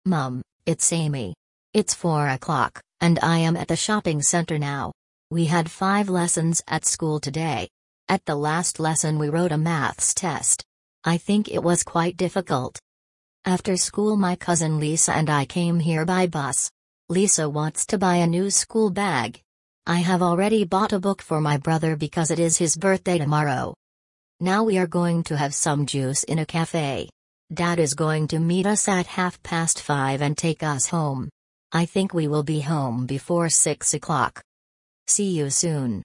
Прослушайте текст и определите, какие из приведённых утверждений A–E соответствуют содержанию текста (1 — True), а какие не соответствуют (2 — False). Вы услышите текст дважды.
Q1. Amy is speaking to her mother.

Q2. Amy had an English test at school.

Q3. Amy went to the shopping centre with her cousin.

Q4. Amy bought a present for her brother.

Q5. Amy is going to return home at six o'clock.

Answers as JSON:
{"1": "True", "2": "False", "3": "True", "4": "True", "5": "True"}

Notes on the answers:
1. Эми обращается к маме: Mum, it's Amy.
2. В школе Эми писала контрольную по математике, а не по английскому языку.
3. После школы Эми отправилась в торговый центр вместе со своей двоюродной сестрой Лизой.
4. Эми купила брату книгу в подарок на день рождения.
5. Эми говорит, что они вернутся домой до шести часов.

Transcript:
Mum, it's Amy.
It's four o'clock, and I am at the shopping centre now. We had five lessons at school today. At the last lesson we wrote a Maths test. I think it was quite difficult.
After school my cousin Lisa and I came here by bus. Lisa wants to buy a new school bag. I have already bought a book for my brother because it is his birthday tomorrow.
Now we are going to have some juice in a café. Dad is going to meet us at half past five and take us home. I think we will be home before six o'clock.
See you soon.

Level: 5 класса